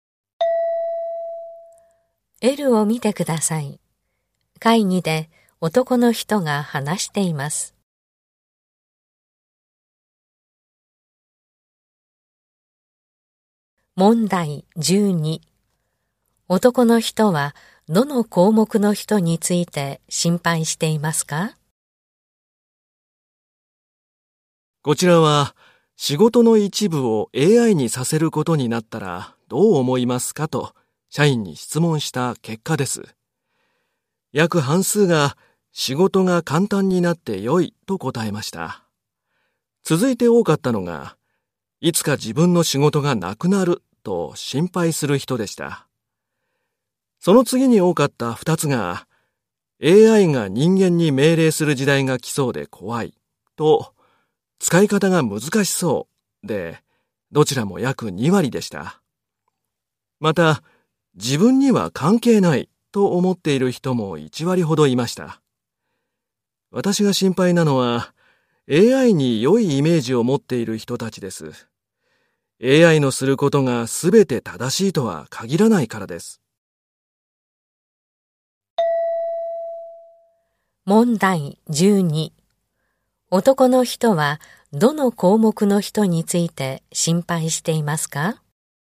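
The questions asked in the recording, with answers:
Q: 男の人はどの項目の人について心配していますか?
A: 仕事が簡単になって良いと答えた人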